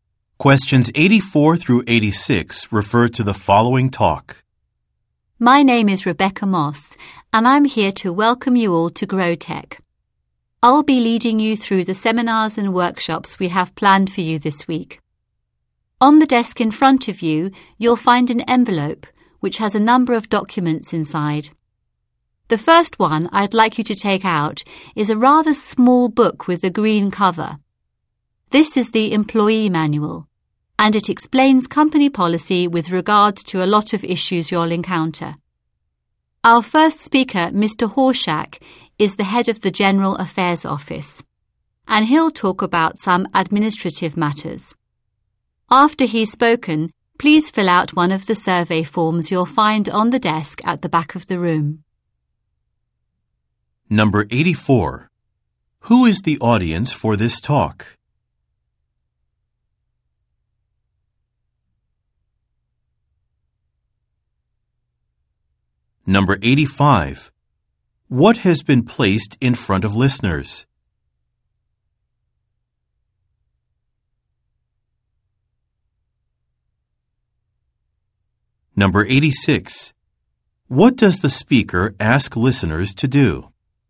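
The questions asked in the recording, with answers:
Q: What has been placed in front of listeners?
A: An envelope with documents inside

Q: What does the speaker ask listeners to do?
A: Fill out a survey form after the first speaker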